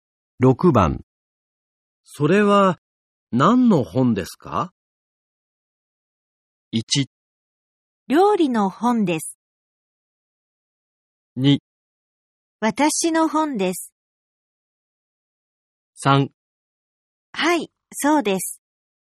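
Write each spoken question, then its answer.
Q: それは何の本ですか?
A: 1: 料理の本です。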